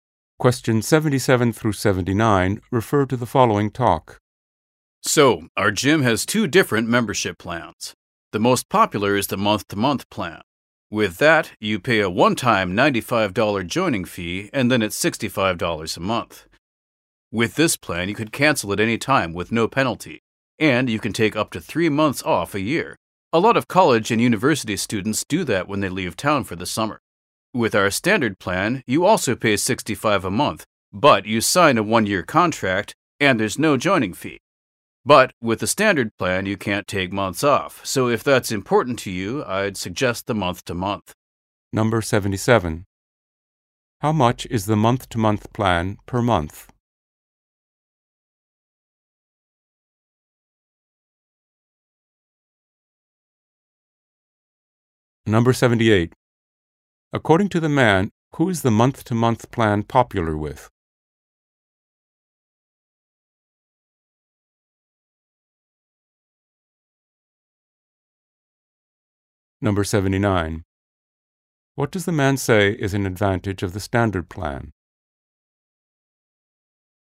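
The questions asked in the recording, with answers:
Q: How much is the month-to-month plan per month?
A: $65

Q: According to the man, who is the month-to-month plan popular with?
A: College and university students

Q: What does the man say is an advantage of the standard plan?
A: There is no joining fee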